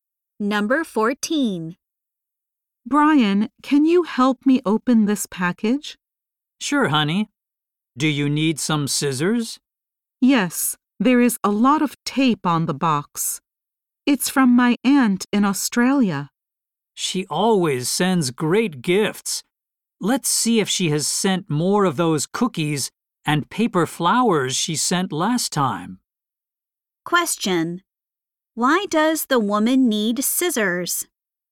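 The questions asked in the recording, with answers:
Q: Why does the woman need scissors?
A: There is a lot of tape on the box.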